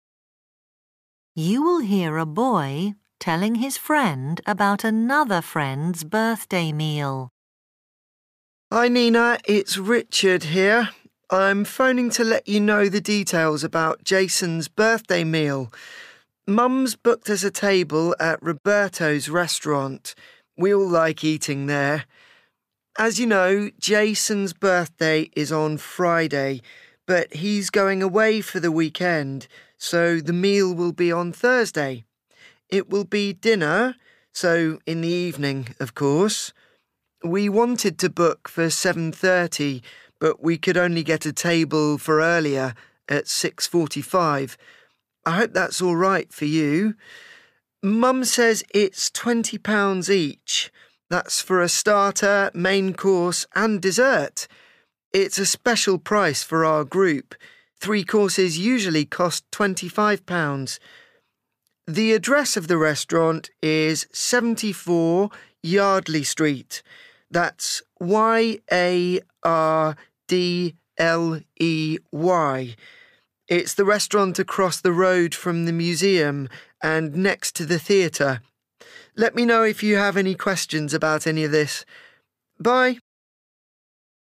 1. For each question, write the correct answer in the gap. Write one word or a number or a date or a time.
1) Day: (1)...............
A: Thursday

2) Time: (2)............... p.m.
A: 6.45

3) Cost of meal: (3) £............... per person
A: 20

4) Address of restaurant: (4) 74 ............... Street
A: Yardley

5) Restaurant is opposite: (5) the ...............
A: museum

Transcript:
Narrator: You will hear a boy telling his friend about another friend's birthday meal.
Richard: Hi, Nina, it's Richard here. I'm phoning to let you know the details about Jason's birthday meal. Mum's booked us a table at Roberto's restaurant – we all like eating there. As you know, Jason's birthday is on Friday, but he's going away for the weekend, so the meal will be on Thursday. It will be dinner, so in the evening, of course. We wanted to book for seven thirty, but we could only get a table for earlier, at six forty-five. I hope that's all right for you. Mum says it's £20 each – that's for a starter, main course and dessert. It's a special price for our group – three courses usually cost £25. The address of the restaurant is 74 Yardley Street. That's Y-A-R-D-L-E-Y. It's the restaurant across the road from the museum, and next to the theatre. Let me know if you have any questions about any of this. Bye.